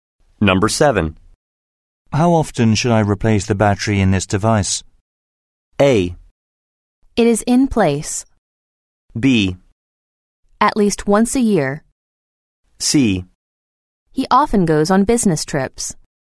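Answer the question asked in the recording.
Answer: B: At least once a year.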